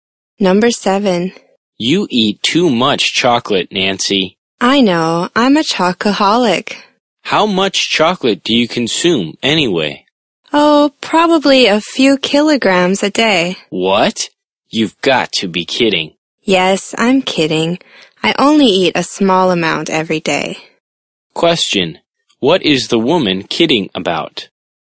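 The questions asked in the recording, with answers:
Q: What is the woman kidding about?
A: How much chocolate she eats (a few kilograms a day)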